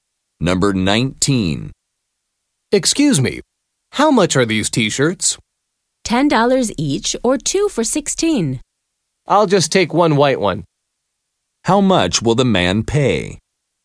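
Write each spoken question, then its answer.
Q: How much will the man pay?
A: $10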